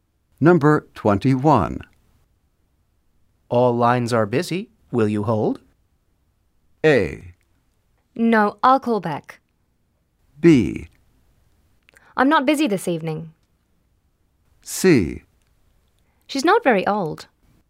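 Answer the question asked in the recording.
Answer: A: No, I'll call back.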